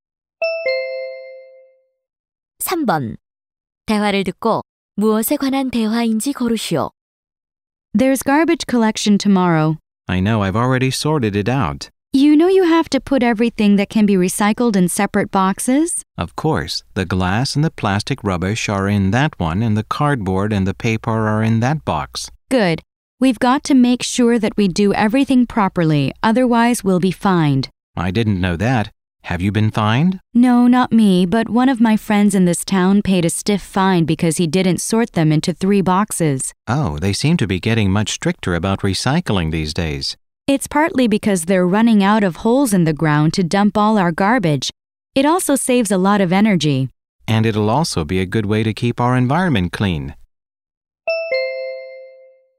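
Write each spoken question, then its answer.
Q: 대화를 듣고 무엇에 관한 대화인지 고르시오.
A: 쓰레기 분리수거 (recycling)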